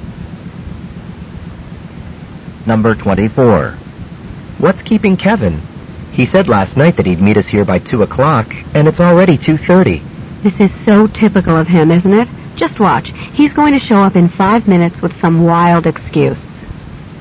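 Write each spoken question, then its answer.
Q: What does the woman mean?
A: Kevin is often late and will arrive soon with an excuse.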